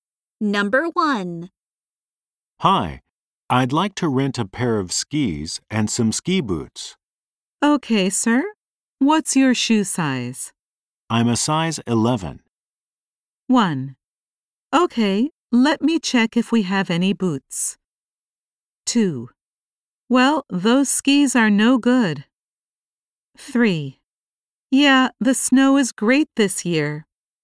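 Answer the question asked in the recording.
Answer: 1: Okay, let me check if we have any boots.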